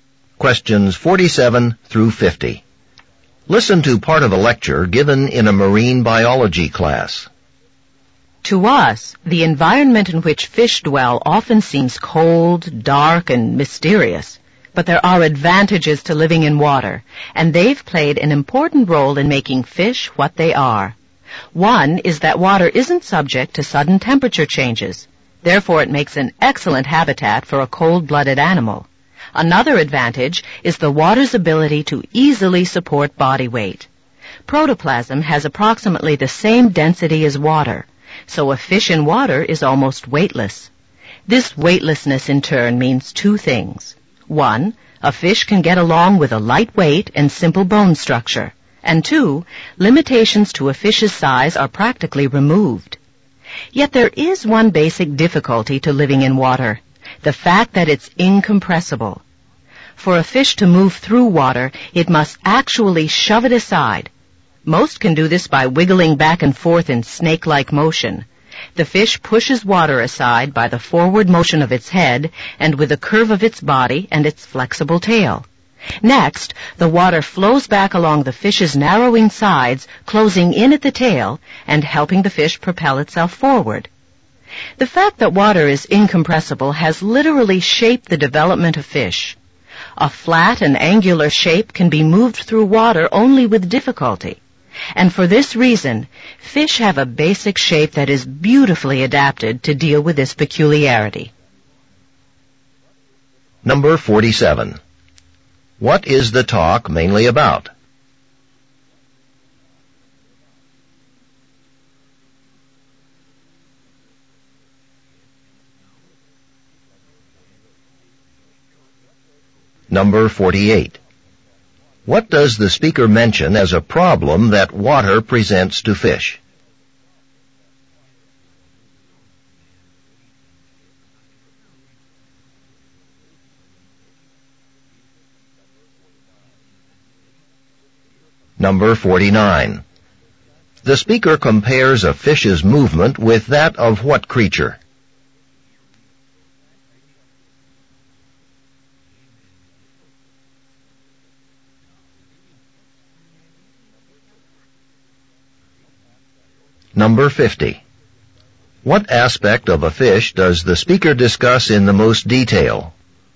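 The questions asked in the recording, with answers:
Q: What does the speaker mention as a problem that water presents to fish?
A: Water is incompressible

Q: The speaker compares a fish's movement with that of what creature?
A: A snake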